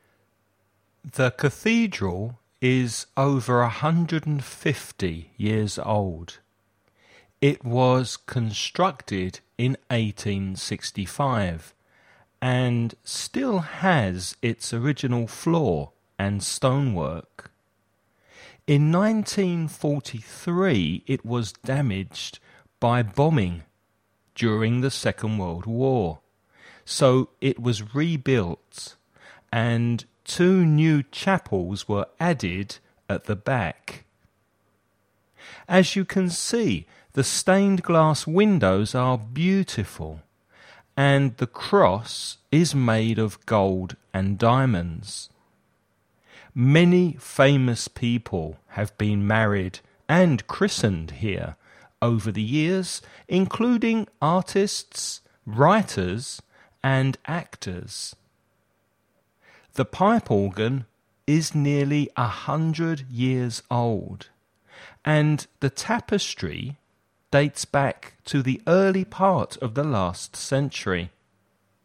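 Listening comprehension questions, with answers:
Escucha el audio y completa el ejercicio.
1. How old is the cathedral?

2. When was it built?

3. When was it damaged?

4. What is the cross made of?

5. What kind of people have been married and christened in the cathedral?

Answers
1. Over 150 years old
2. In 1865
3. In 1943
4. Gold and diamonds
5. Famous people: artists, writers and actors

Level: nivel básico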